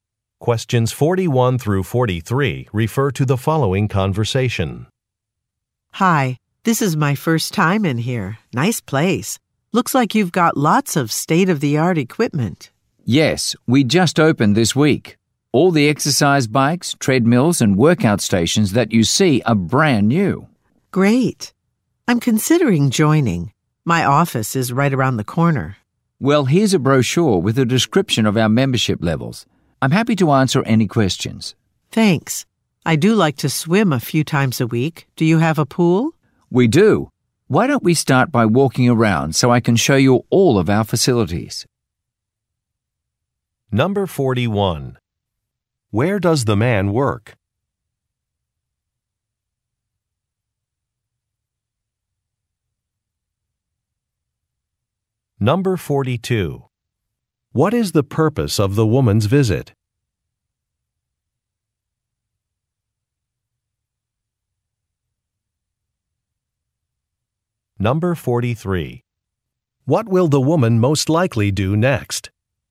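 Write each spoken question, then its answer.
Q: Where does the man work?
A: At a new fitness center

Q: What is the purpose of the woman's visit?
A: She is considering joining the gym

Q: What will the woman most likely do next?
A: Take a tour of the facilities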